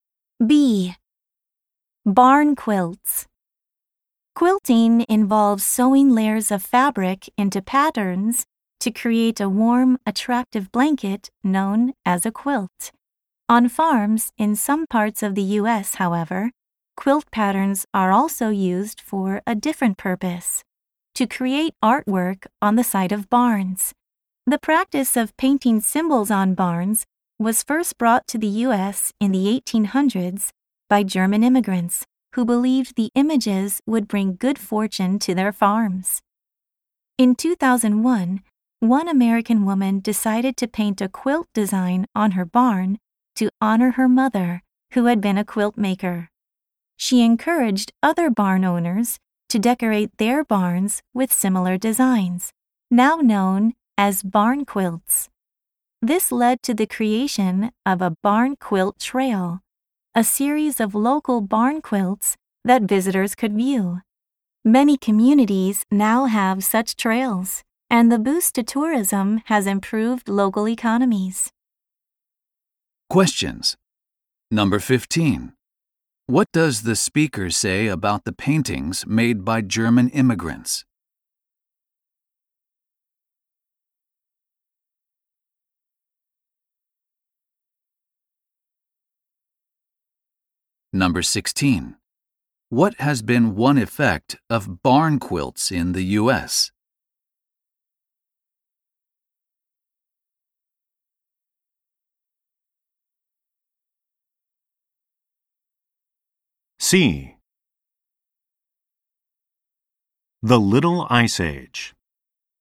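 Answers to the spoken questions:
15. They were believed to bring good fortune to farms
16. Tourism has increased, improving local economies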